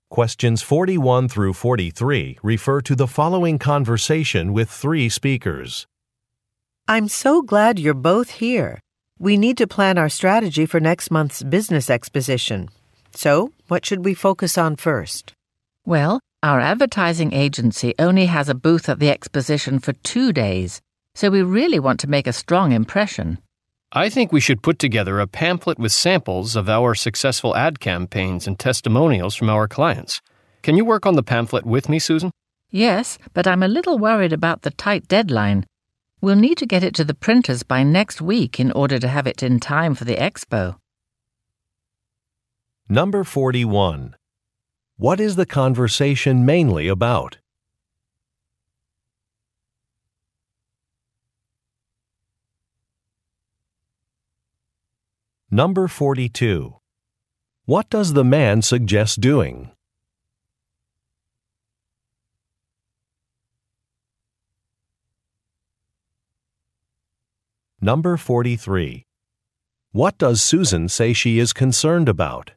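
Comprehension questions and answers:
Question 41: What is the conversation mainly about?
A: Preparing for a business exposition

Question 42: What does the man suggest doing?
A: Making a pamphlet

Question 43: What does Susan say she is concerned about?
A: An approaching deadline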